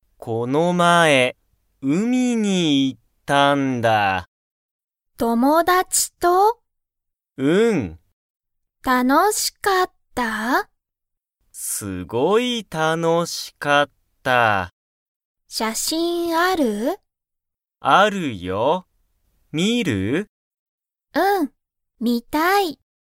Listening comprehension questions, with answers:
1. マキは、____が見(み)たい。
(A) 写真しゃしん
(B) 友達(ともだち)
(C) 仕事しごと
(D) 家(いえ)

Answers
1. (A) 写真しゃしん

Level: Level 1

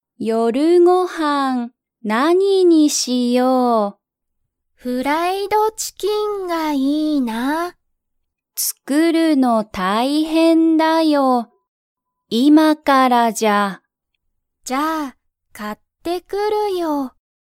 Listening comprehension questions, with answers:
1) アキはフライドチキンを作(つく)りますか?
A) はい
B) いいえ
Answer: B) いいえ

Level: Level 1

